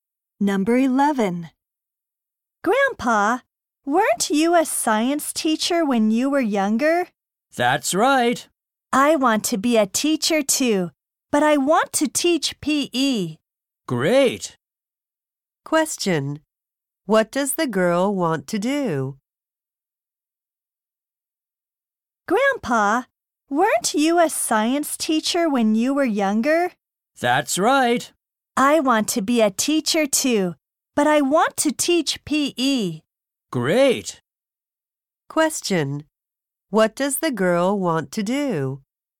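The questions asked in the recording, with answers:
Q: What does the girl want to do?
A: Become a PE teacher.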